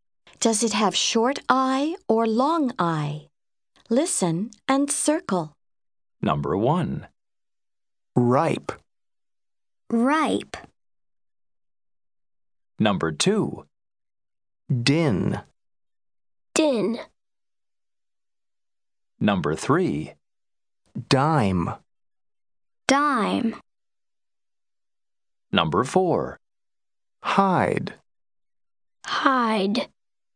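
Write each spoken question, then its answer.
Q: Ripe.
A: long I

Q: Dime.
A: long I

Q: Hide.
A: long I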